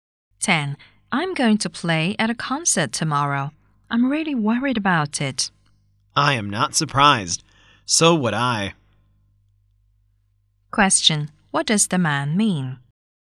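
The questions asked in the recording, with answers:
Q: What does the man mean?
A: He would be worried too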